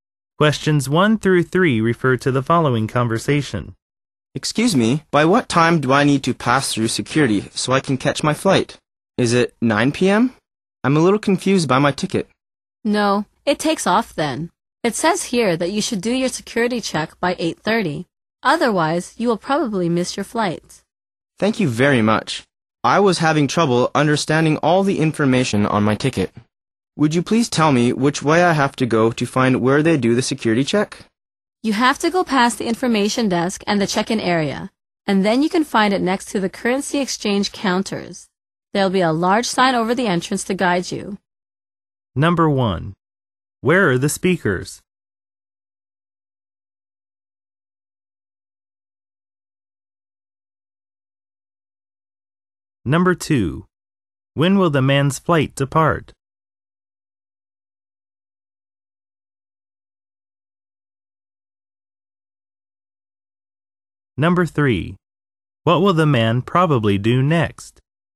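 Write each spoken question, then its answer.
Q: Where are the speakers?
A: At an airport

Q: When will the man's flight depart?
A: At 9 p.m.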